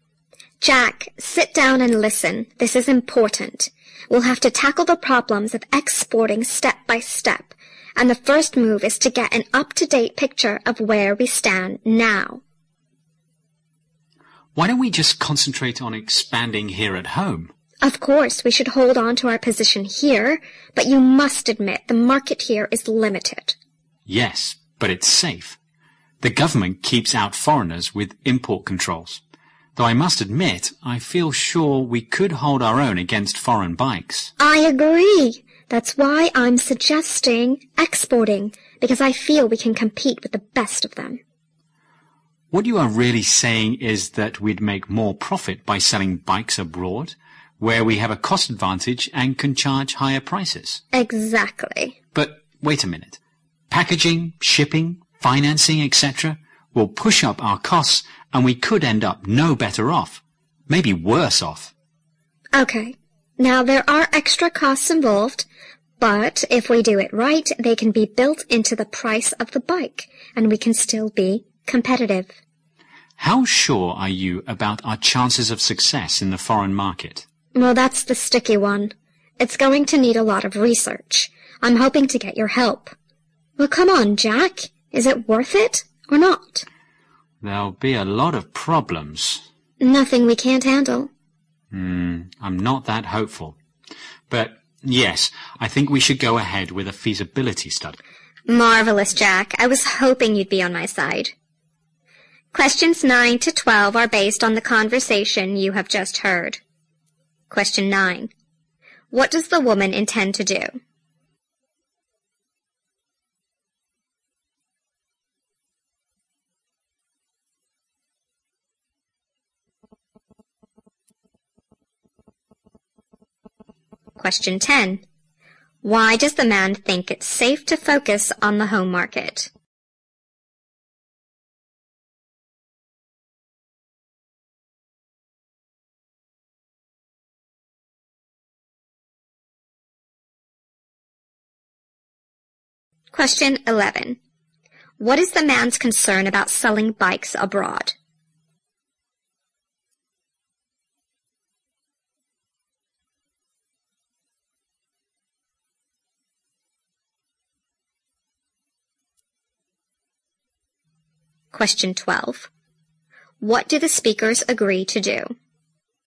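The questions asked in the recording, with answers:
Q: What does the woman intend to do?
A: Export bikes abroad

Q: Why does the man think it's safe to focus on the home market?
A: The government keeps out foreigners with import controls

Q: What is the man's concern about selling bikes abroad?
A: Extra costs like packaging, shipping and financing could leave them no better off

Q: What do the speakers agree to do?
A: Go ahead with a feasibility study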